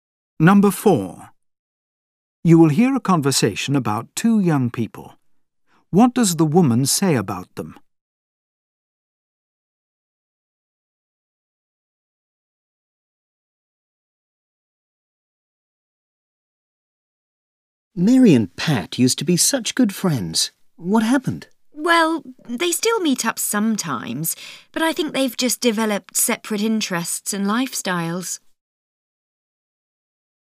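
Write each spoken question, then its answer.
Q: What does the woman say about them?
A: They have drifted apart, developing separate interests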